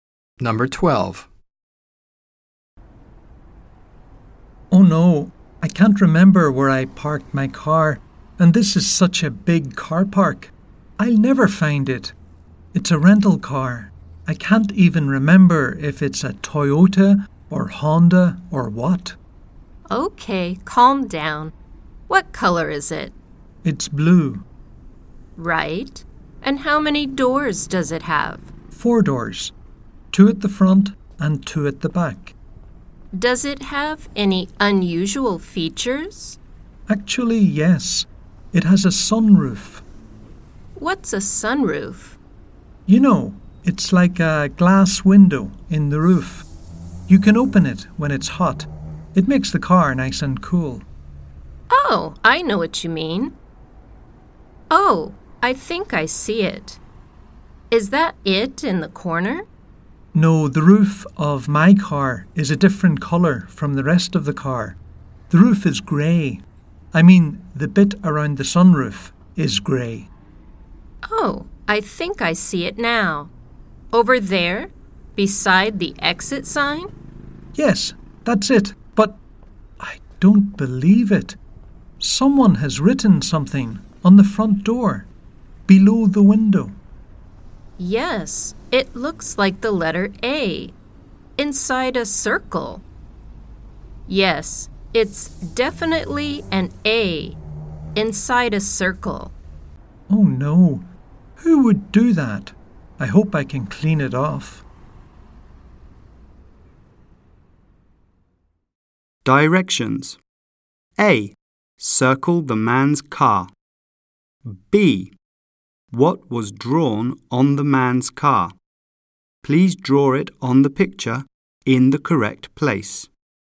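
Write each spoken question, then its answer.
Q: B. What was drawn on the man's car?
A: The letter A inside a circle, on the front door below the window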